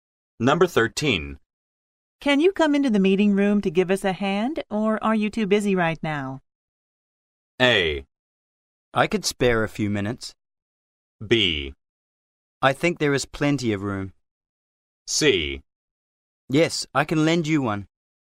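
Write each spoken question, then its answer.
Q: Can you come into the meeting room to give us a hand, or are you too busy right now?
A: A: I could spare a few minutes.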